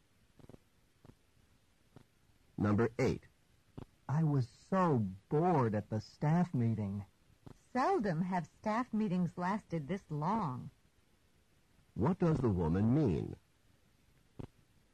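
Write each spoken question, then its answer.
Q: What does the woman mean?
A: Staff meetings are rarely this long.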